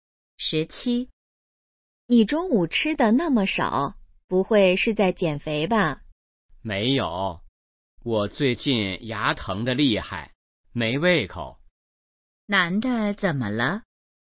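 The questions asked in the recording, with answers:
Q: 男的怎么了?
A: 牙疼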